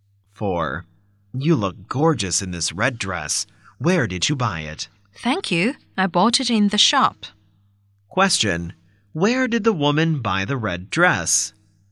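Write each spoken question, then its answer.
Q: Where did the woman buy the red dress?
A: In the shop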